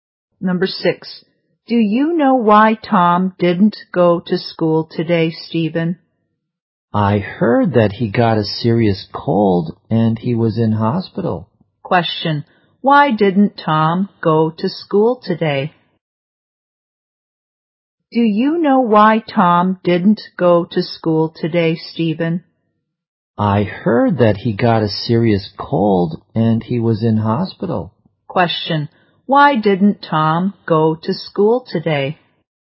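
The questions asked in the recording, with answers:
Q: why didn't Tom go to school today?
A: He had a serious cold and was in hospital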